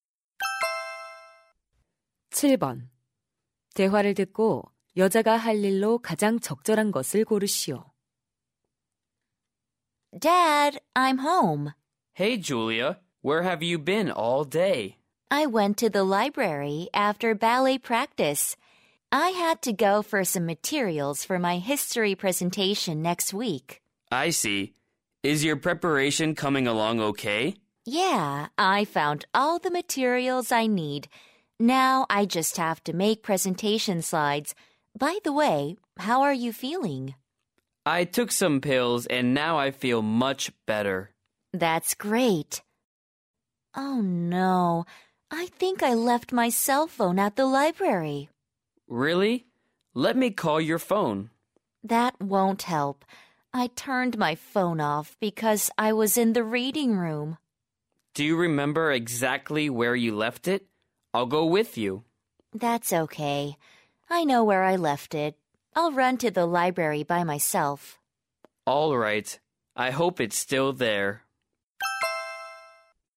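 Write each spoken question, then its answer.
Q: 대화를 듣고 여자가 할 일로 가장 적절한 것을 고르시오.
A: 도서관에 가서 휴대전화 찾아오기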